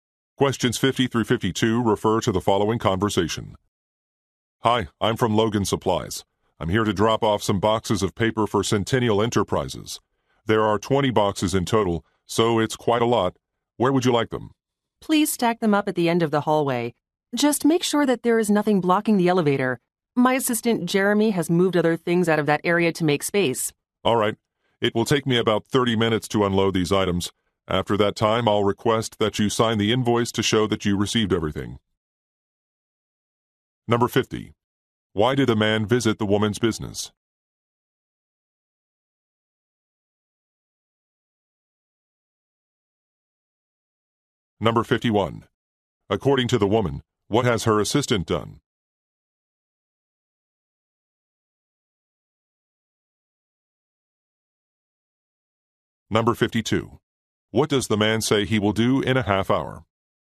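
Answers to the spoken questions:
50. To deliver boxes of paper
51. Moved things out of the area to make space
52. Ask her to sign the invoice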